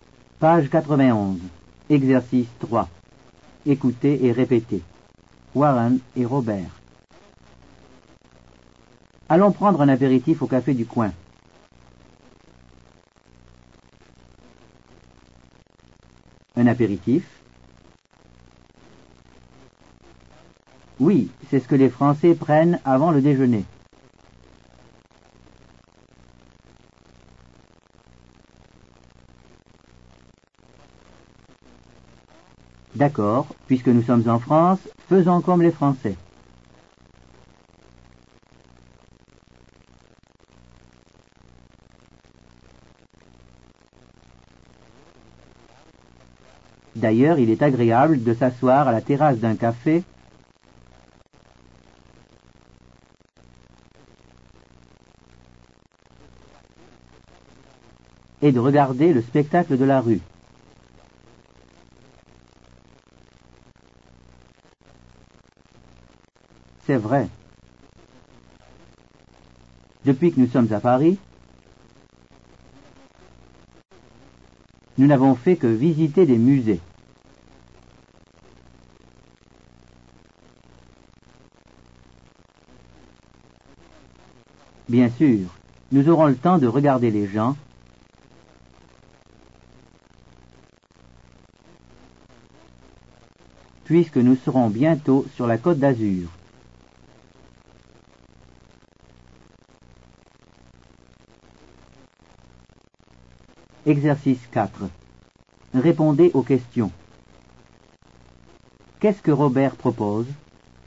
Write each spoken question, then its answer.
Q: Qu'est-ce que Robert propose?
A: Robert propose d'aller prendre l'apéritif.